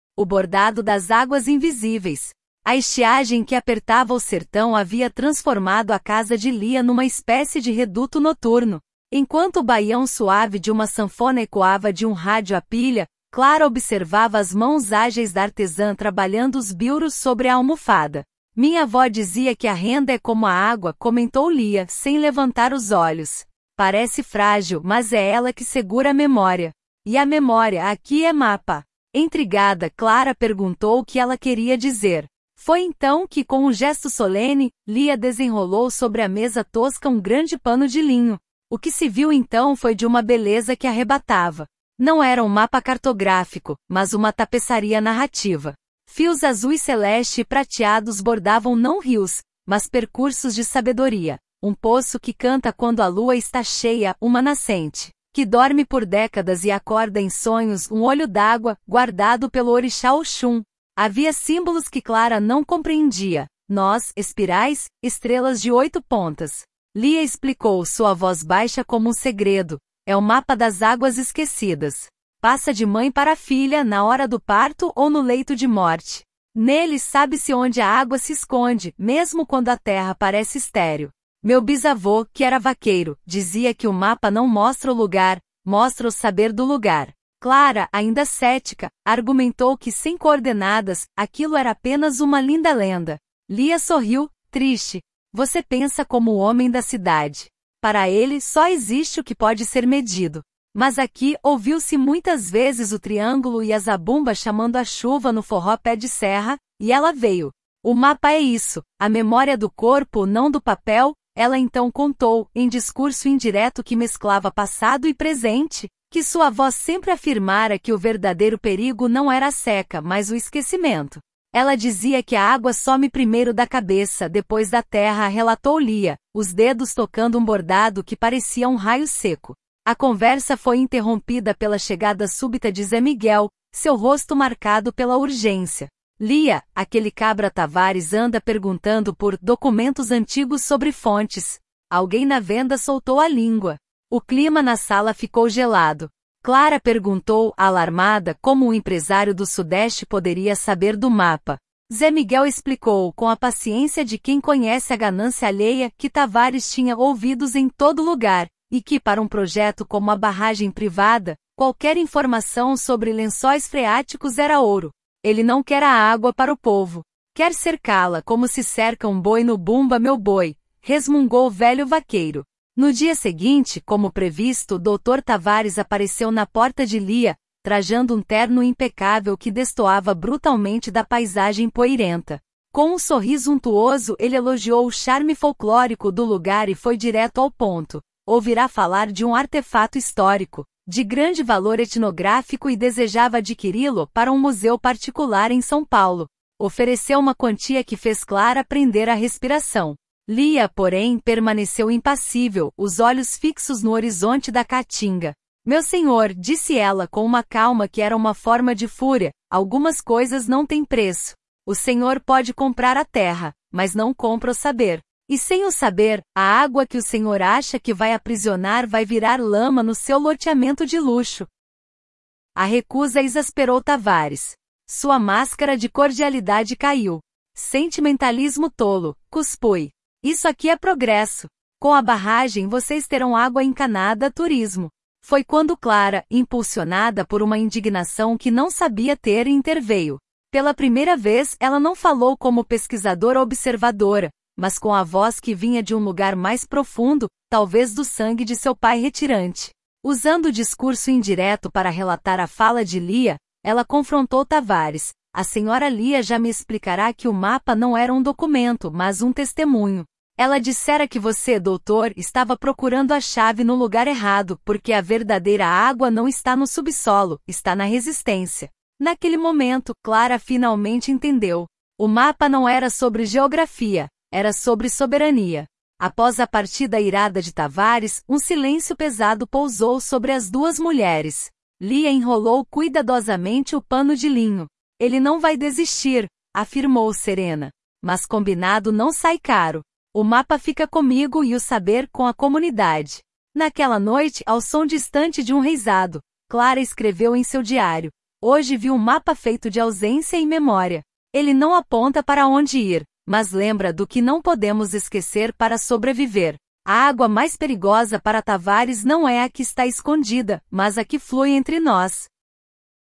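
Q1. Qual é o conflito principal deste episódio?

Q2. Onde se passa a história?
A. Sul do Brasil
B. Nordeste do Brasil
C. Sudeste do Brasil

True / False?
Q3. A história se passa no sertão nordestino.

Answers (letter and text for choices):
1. O empresário Tavares tenta comprar o mapa bordado das águas esquecidas, e Lia se recusa a vendê-lo.
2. B. Nordeste do Brasil
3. True

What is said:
O Bordado das Águas Invisíveis – TEST
A estiagem que apertava o sertão havia transformado a casa de Lia numa espécie de reduto noturno. Enquanto o baião suave de uma sanfona ecoava de um rádio à pilha, Clara observava as mãos ágeis da artesã trabalhando os bilros sobre a almofada. 'Minha avó dizia que a renda é como a água', comentou Lia, sem levantar os olhos. 'Parece frágil, mas é ela que segura a memória. E a memória, aqui, é mapa.' Intrigada, Clara perguntou o que ela queria dizer. Foi então que, com um gesto solene, Lia desenrolou sobre a mesa tosca um grande pano de linho.
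O que se viu então foi de uma beleza que arrebatava. Não era um mapa cartográfico, mas uma tapeçaria narrativa. Fios azuis-celeste e prateados bordavam não rios, mas percursos de sabedoria: um poço 'que canta quando a lua está cheia', uma nascente 'que dorme por décadas e acorda em sonhos', um olho d'água 'guardado pelo orixá Oxum'. Havia símbolos que Clara não compreendia – nós, espirais, estrelas de oito pontas. Lia explicou, sua voz baixa como um segredo: 'É o Mapa das Águas Esquecidas. Passa de mãe para filha, na hora do parto ou no leito de morte. Nele, sabe-se onde a água se esconde, mesmo quando a terra parece estéril. Meu bisavô, que era vaqueiro, dizia que o mapa não mostra o lugar, mostra o saber do lugar.'
Clara, ainda cética, argumentou que, sem coordenadas, aquilo era apenas uma linda lenda. Lia sorriu, triste. 'Você pensa como o homem da cidade. Para ele, só existe o que pode ser medido. 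Mas aqui, ouviu-se muitas vezes o triângulo e a zabumba chamando a chuva no forró pé-de-serra, e ela veio. O mapa é isso: a memória do corpo, não do papel.' Ela então contou, em discurso indireto que mesclava passado e presente, que sua avó sempre afirmara que o verdadeiro perigo não era a seca, mas o esquecimento. 'Ela dizia que a água some primeiro da cabeça, depois da terra', relatou Lia, os dedos tocando um bordado que parecia um raio seco.
A conversa foi interrompida pela chegada súbita de Zé Miguel, seu rosto marcado pela urgência. 'Lia, aquele cabra Tavares anda perguntando por 'documentos antigos sobre fontes'. Alguém na venda soltou a língua.' O clima na sala ficou gelado. Clara perguntou, alarmada, como um empresário do Sudeste poderia saber do mapa. Zé Miguel explicou, com a paciência de quem conhece a ganância alheia, que Tavares tinha 'ouvidos em todo lugar' e que, para um projeto como a barragem privada, qualquer informação sobre lençóis freáticos era ouro. 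'Ele não quer a água para o povo. Quer cercá-la, como se cerca um boi no Bumba Meu Boi.', resmungou o velho vaqueiro.
No dia seguinte, como previsto, Dr. Tavares apareceu na porta de Lia, trajando um terno impecável que destoava brutalmente da paisagem poeirenta. Com um sorriso untuoso, ele elogiou o 'charme folclórico' do lugar e foi direto ao ponto: ouvira falar de um 'artefato histórico' de grande valor etnográfico e desejava adquiri-lo para um museu particular em São Paulo. Ofereceu uma quantia que fez Clara prender a respiração. Lia, porém, permaneceu impassível, os olhos fixos no horizonte da caatinga. 'Meu senhor', disse ela, com uma calma que era uma forma de fúria, 'algumas coisas não têm preço. O senhor pode comprar a terra, mas não compra o saber. E sem o saber, a água que o senhor acha que vai aprisionar vai virar lama no seu loteamento de luxo.'
A recusa exasperou Tavares. Sua máscara de cordialidade caiu. 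'Sentimentalismo tolo!', cuspui. 'Isso aqui é progresso! Com a barragem, vocês terão água encanada, turismo.' Foi quando Clara, impulsionada por uma indignação que não sabia ter, interveio. Pela primeira vez, ela não falou como pesquisadora observadora, mas com a voz que vinha de um lugar mais profundo, talvez do sangue de seu pai retirante. Usando o discurso indireto para relatar a fala de Lia, ela confrontou Tavares: 'A senhora Lia já me explicara que o mapa não era um documento, mas um testemunho. Ela dissera que você, doutor, estava procurando a chave no lugar errado, porque a verdadeira água não está no subsolo, está na resistência.' Naquele momento, Clara finalmente entendeu. O mapa não era sobre geografia; era sobre soberania.
Após a partida irada de Tavares, um silêncio pesado pousou sobre as duas mulheres. Lia enrolou cuidadosamente o pano de linho. 'Ele não vai desistir', afirmou, serena. 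'Mas combinado não sai caro. O mapa fica comigo, e o saber, com a comunidade.' Naquela noite, ao som distante de um reisado, Clara escreveu em seu diário: 'Hoje vi um mapa feito de ausência e memória. Ele não aponta para onde ir, mas lembra do que não podemos esquecer para sobreviver. A água mais perigosa para Tavares não é a que está escondida, mas a que flui entre nós.'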